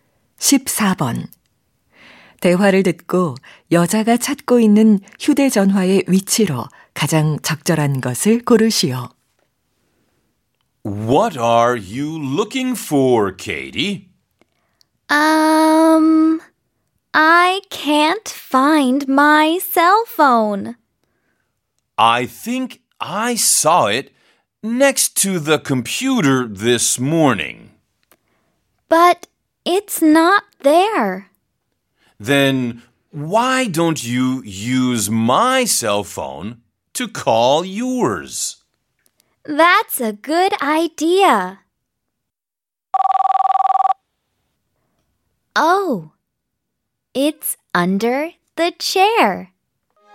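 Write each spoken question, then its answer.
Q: 대화를 듣고 여자가 찾고 있는 휴대전화의 위치로 가장 적절한 것을 고르시오.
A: 의자 밑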